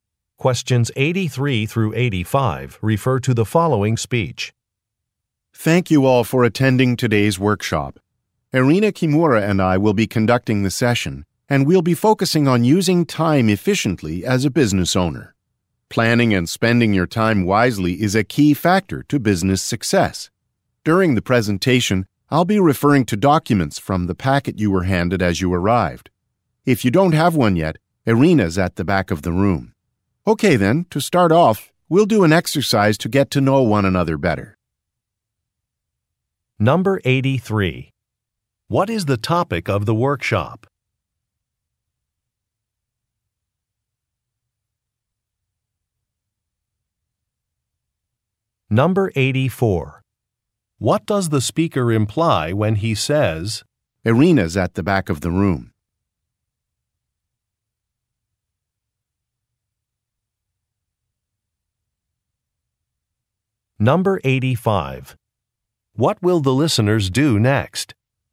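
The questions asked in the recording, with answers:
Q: What is the topic of the workshop?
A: Using time efficiently as a business owner

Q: What does the speaker imply when he says,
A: Listeners without a packet can get one from Irina

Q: What will the listeners do next?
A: Do an exercise to get to know one another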